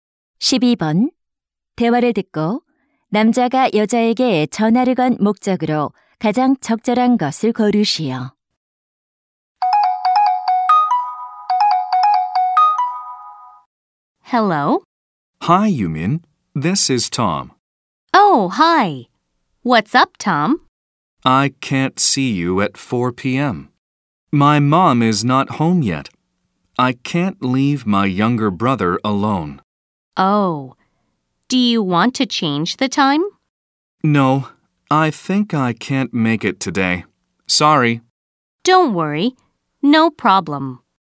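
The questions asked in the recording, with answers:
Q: 대화를 듣고 남자가 여자에게 전화를 건 목적으로 가장 적절한 것을 고르시오.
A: 약속을 취소하려고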